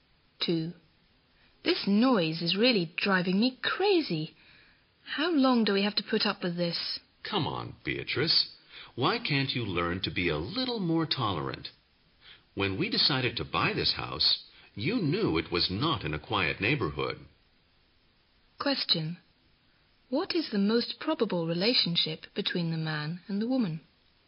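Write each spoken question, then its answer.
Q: What is the most probable relationship between the man and the woman?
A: Husband and wife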